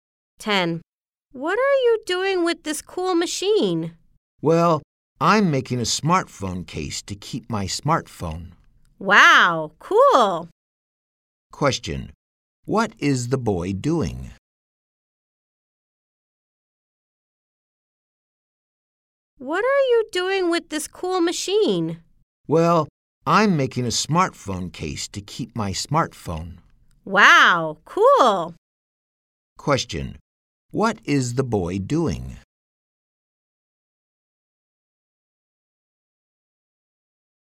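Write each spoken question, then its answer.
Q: What is the boy doing?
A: Making a smartphone case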